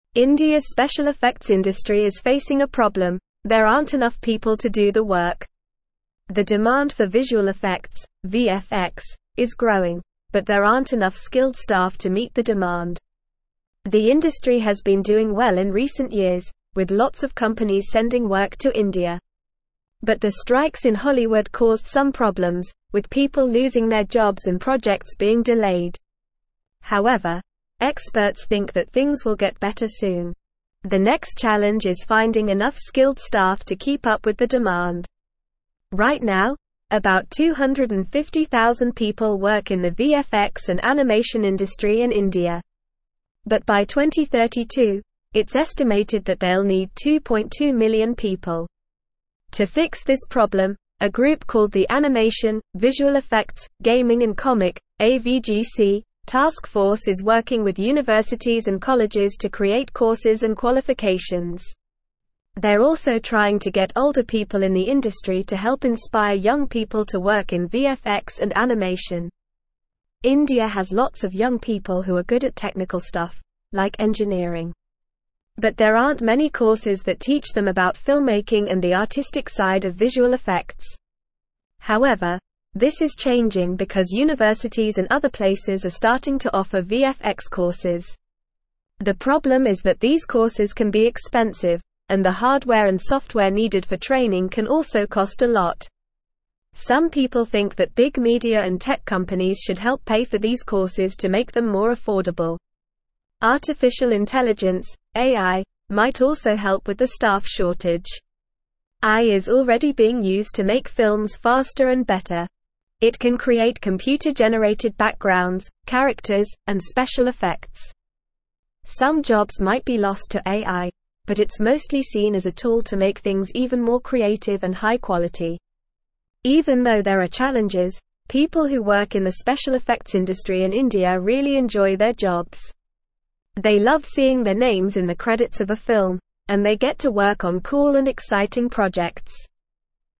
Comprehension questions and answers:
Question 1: (1)______'s (2)______ effects industry is facing a problem – there aren't enough (3)______ to do the work.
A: India

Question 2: (1)______'s (2)______ effects industry is facing a problem – there aren't enough (3)______ to do the work.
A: special

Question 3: (1)______'s (2)______ effects industry is facing a problem – there aren't enough (3)______ to do the work.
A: people

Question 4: However, experts (4)______ that things will get better soon.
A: think

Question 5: Right now, about 250,000 people work in the VFX and animation (5)______ in India.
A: industry

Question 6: To fix this problem, a group called the Animation, Visual (6)______, Gaming and (7)______ (AVGC) Task Force is working with universities and colleges to create (8)______ and qualifications.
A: Effects

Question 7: To fix this problem, a group called the Animation, Visual (6)______, Gaming and (7)______ (AVGC) Task Force is working with universities and colleges to create (8)______ and qualifications.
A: Comic

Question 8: To fix this problem, a group called the Animation, Visual (6)______, Gaming and (7)______ (AVGC) Task Force is working with universities and colleges to create (8)______ and qualifications.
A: courses

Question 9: India has lots of young people who are good at (9)______ stuff, like (10)______.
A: technical

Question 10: India has lots of young people who are good at (9)______ stuff, like (10)______.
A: engineering

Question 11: However, this is changing because universities and other (11)______ are (12)______ to offer VFX courses.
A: places

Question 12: However, this is changing because universities and other (11)______ are (12)______ to offer VFX courses.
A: starting

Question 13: It can create computer-generated (13)______, characters, and special (14)______.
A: backgrounds

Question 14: It can create computer-generated (13)______, characters, and special (14)______.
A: effects

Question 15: Even though there are (15)______, people who work in the special effects industry in India really enjoy their jobs.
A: challenges

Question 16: They love seeing their names in the (16)______ of a film, and they get to work on cool and exciting projects.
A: credits

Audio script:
India's special effects industry is facing a problem – there aren't enough people to do the work. The demand for visual effects (VFX) is growing, but there aren't enough skilled staff to meet the demand. The industry has been doing well in recent years, with lots of companies sending work to India. But the strikes in Hollywood caused some problems, with people losing their jobs and projects being delayed. However, experts think that things will get better soon. The next challenge is finding enough skilled staff to keep up with the demand.
Right now, about 250,000 people work in the VFX and animation industry in India. But by 2032, it's estimated that they'll need 2.2 million people. To fix this problem, a group called the Animation, Visual Effects, Gaming and Comic (AVGC) Task Force is working with universities and colleges to create courses and qualifications. They're also trying to get older people in the industry to help inspire young people to work in VFX and animation.
India has lots of young people who are good at technical stuff, like engineering. But there aren't many courses that teach them about filmmaking and the artistic side of visual effects. However, this is changing because universities and other places are starting to offer VFX courses. The problem is that these courses can be expensive, and the hardware and software needed for training can also cost a lot. Some people think that big media and tech companies should help pay for these courses to make them more affordable.
Artificial intelligence (AI) might also help with the staff shortage. AI is already being used to make films faster and better. It can create computer-generated backgrounds, characters, and special effects. Some jobs might be lost to AI, but it's mostly seen as a tool to make things even more creative and high-quality.
Even though there are challenges, people who work in the special effects industry in India really enjoy their jobs. They love seeing their names in the credits of a film, and they get to work on cool and exciting projects.

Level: Level 3